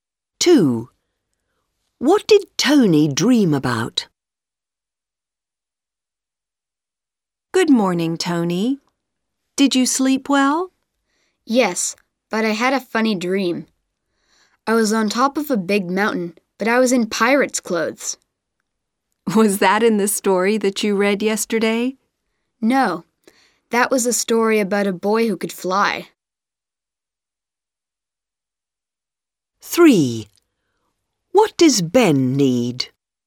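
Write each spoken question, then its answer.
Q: What did Tony dream about?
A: Being on top of a big mountain in pirate's clothes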